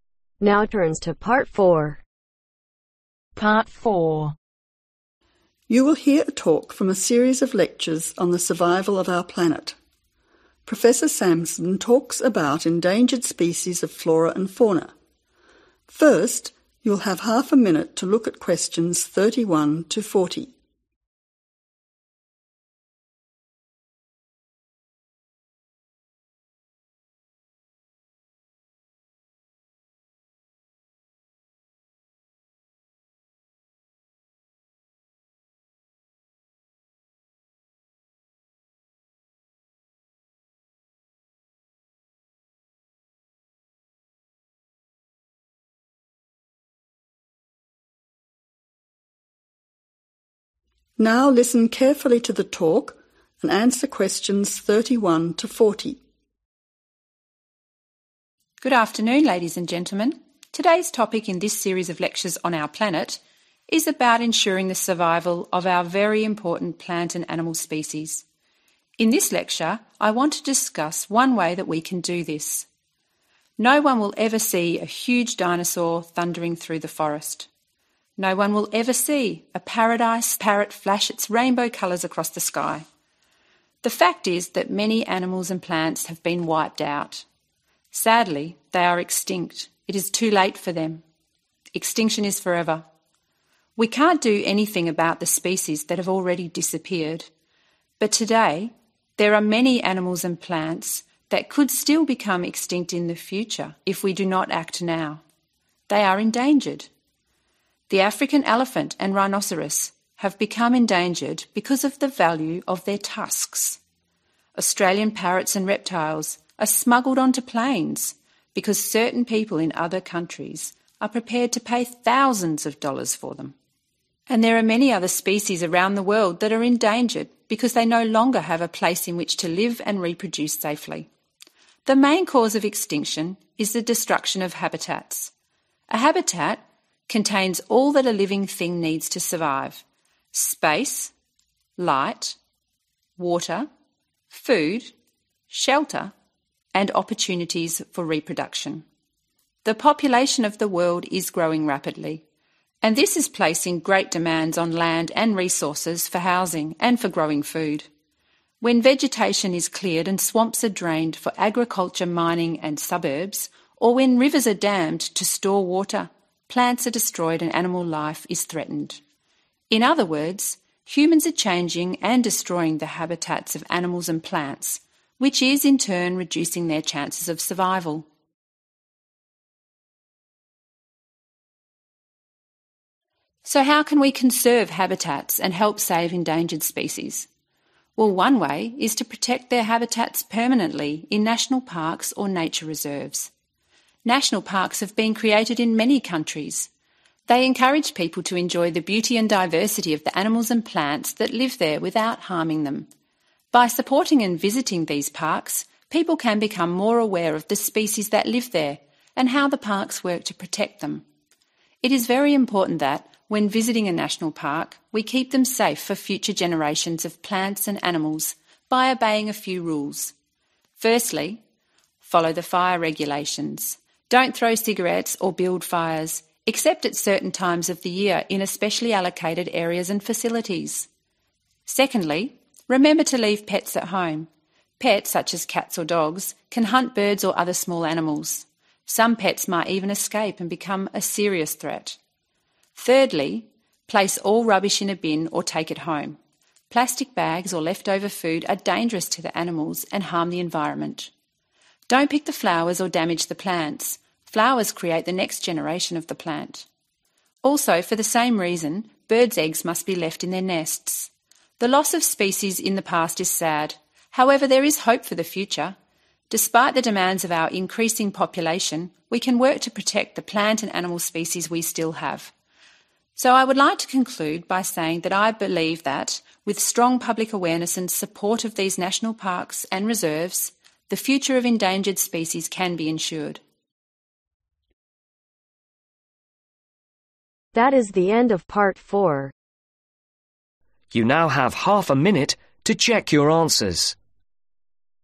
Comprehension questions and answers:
Complete the summary below. Write ONE WORD ONLY for each answer.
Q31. Although we cannot do anything about the plants and animals that are already (31) ............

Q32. The main reason for the growing number of (32) ............ species is the destruction of their (33) ............ .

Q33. The main reason for the growing number of (32) ............ species is the destruction of their (33) ............ .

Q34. The rapidly (34) ............ human population needs more land resources for housing and (35) ............ .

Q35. The rapidly (34) ............ human population needs more land resources for housing and (35) ............ .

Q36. This is changing and destroying the habitats that plant and animals species need for (36) ............ .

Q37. One way we can save endangered species and permanently (37) ............ these habitats is to create and support national parks and reserves.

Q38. National parks encourage people to enjoy the (38) ............ and diversity of species without harming them.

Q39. These include following fir regulations, leaving pets at (39) ............, placing all rubbish in a bin, not picking the flowers, and not taking birds' eggs.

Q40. Public (40) ............ and awareness will help ensure the survival of our plant and animal species.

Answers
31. extinct
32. endangered
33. habitats
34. increasing/growing
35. food
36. survival
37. protect/conserve
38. beauty
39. home
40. support